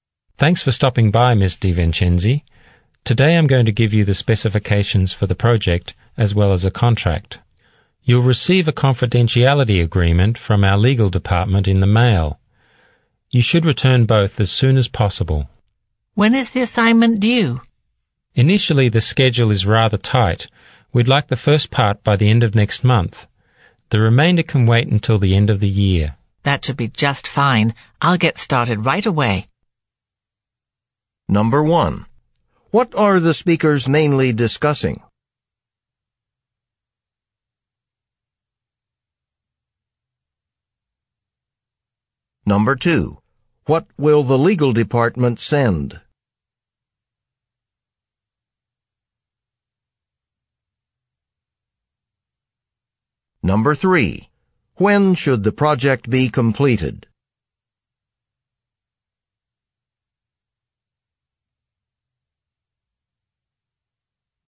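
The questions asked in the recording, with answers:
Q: What are the speakers mainly discussing?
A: A new project assignment and its contract and schedule

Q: What will the legal department send?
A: A confidentiality agreement

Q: When should the project be completed?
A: By the end of the year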